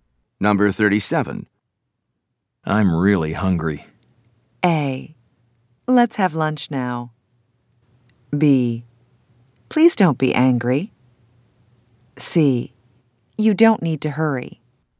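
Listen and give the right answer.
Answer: A: Let's have lunch now.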